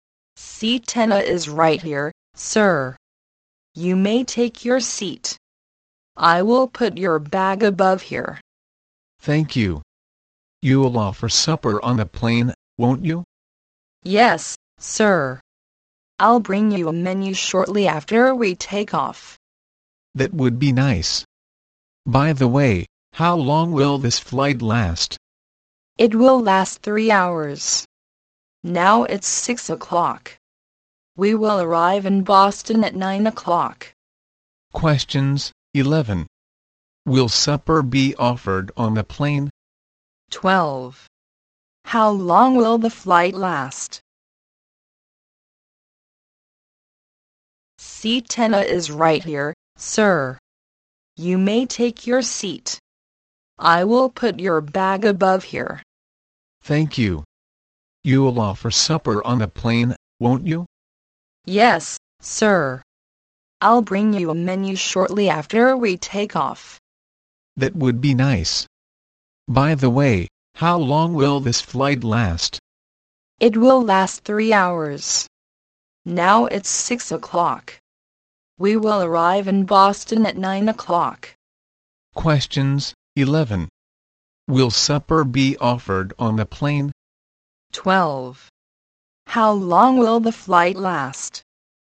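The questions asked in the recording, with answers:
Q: Will supper be offered on the plane?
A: Yes

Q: How long will the flight last?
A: 3 hours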